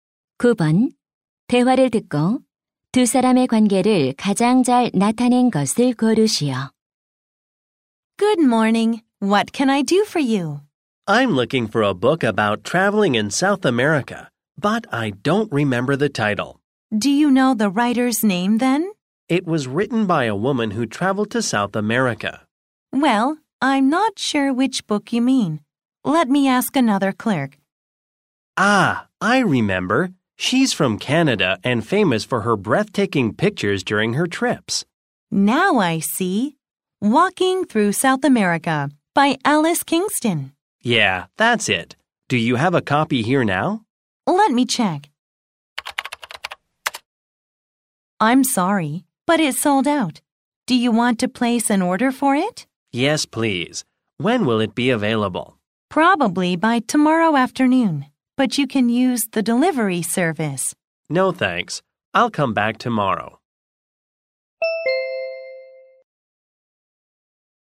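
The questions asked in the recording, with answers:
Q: 대화를 듣고 두 사람의 관계를 가장 잘 나타낸 것을 고르시오.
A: 서점 직원 - 손님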